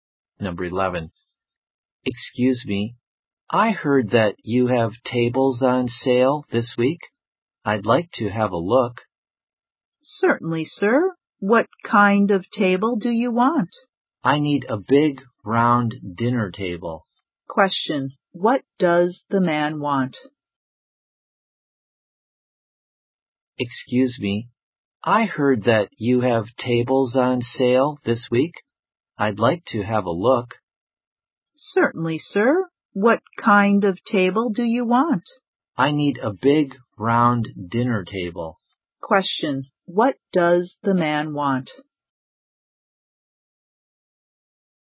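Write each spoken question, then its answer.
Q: Question, what does the man want?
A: A big, round dinner table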